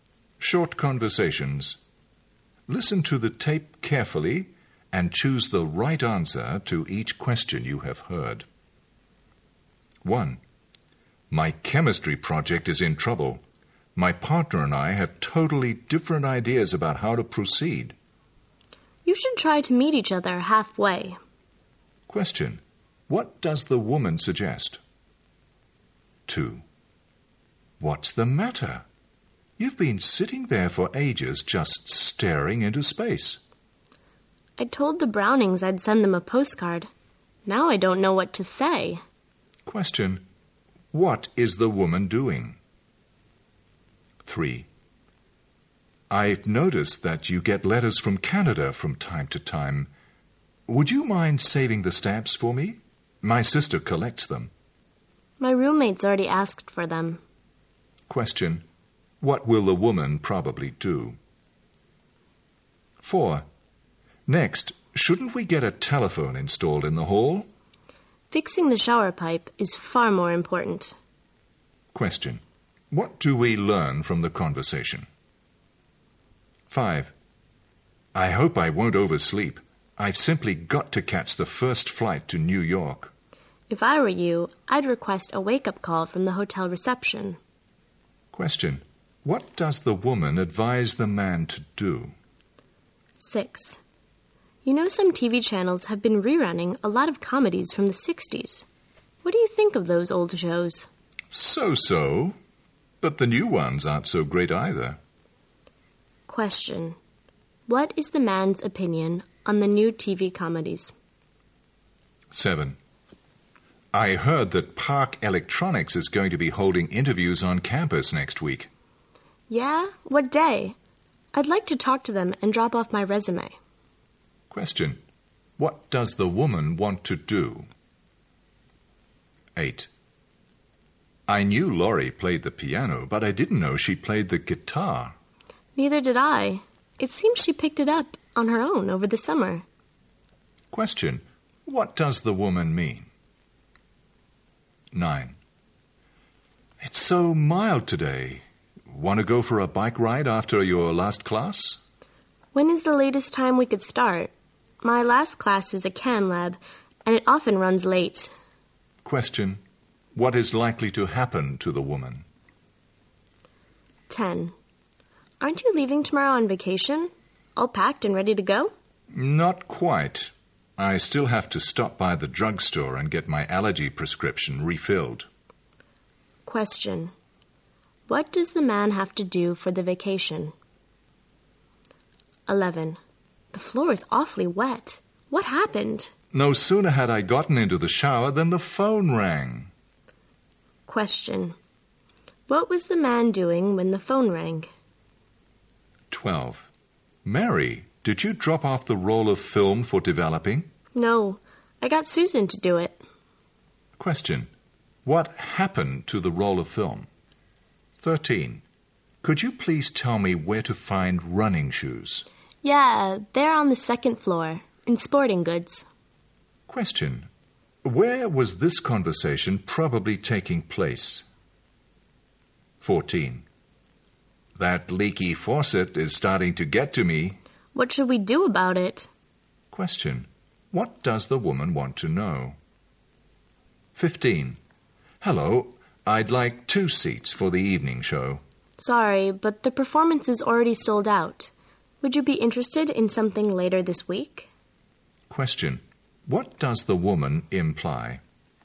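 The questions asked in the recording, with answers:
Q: What does the woman suggest?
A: Meet the partner halfway (compromise)

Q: What does the woman advise the man to do?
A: Request a wake-up call from the hotel reception

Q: What does the woman want to do?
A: Talk to Park Electronics and drop off her resume

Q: What does the woman mean?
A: She didn't know either; Laurie taught herself guitar over the summer

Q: What does the man have to do for the vacation?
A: Get his allergy prescription refilled at the drugstore

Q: What was the man doing when the phone rang?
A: Taking a shower

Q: What happened to the roll of film?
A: Susan dropped it off for developing

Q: What does the woman want to know?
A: What to do about the leaky faucet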